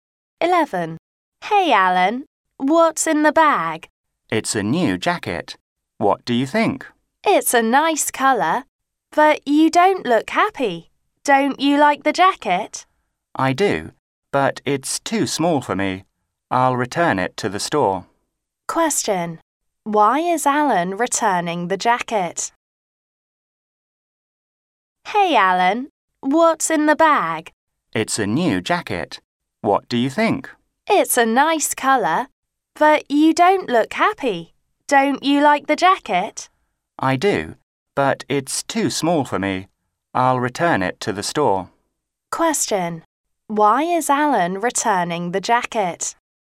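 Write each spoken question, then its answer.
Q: Why is Alan returning the jacket?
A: It's too small for him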